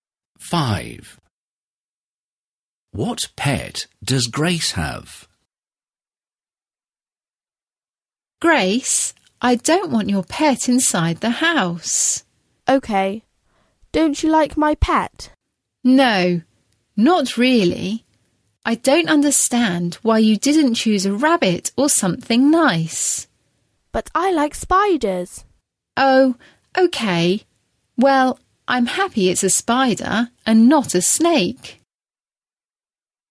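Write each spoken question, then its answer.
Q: What pet does Grace have?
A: A spider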